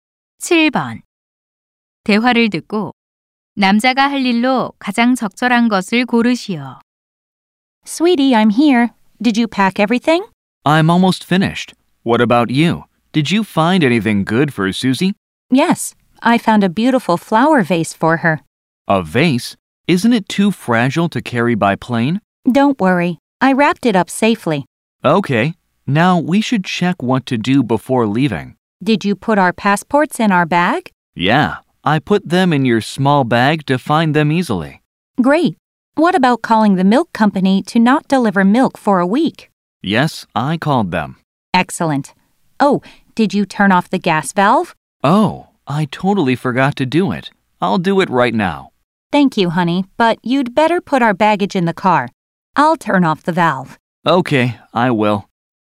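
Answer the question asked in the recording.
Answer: 짐을 차에 싣기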